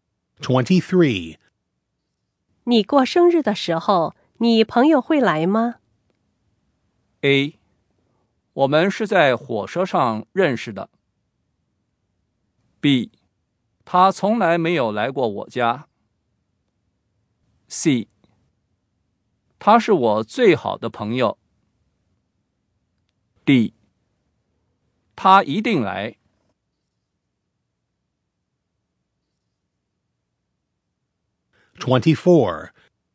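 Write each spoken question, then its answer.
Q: 你过生日的时候,你朋友会来吗?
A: D: 他一定来。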